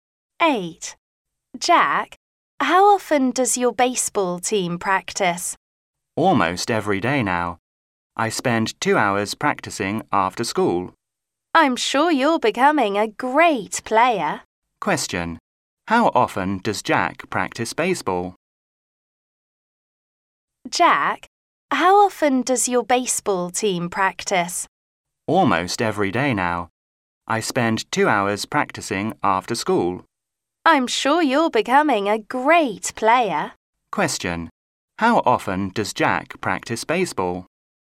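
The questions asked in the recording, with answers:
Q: How often does Jack practice baseball?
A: Almost every day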